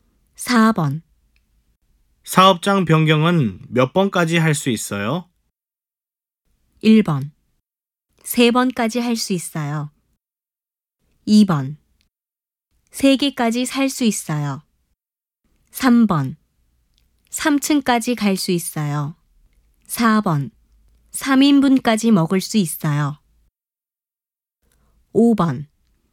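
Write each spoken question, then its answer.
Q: 사업장 변경은 몇 번까지 할 수 있어요?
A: 1: 세 번까지 할 수 있어요.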